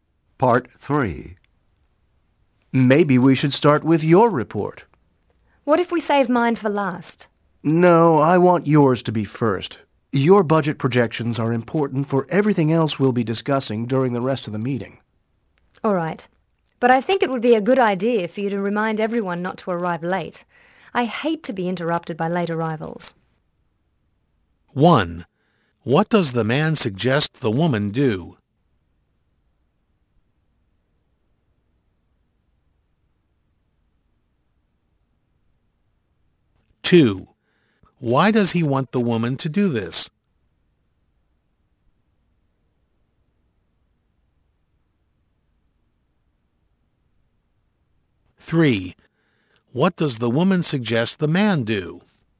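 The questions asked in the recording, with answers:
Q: Why does he want the woman to do this?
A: Her budget projections are important for the rest of the meeting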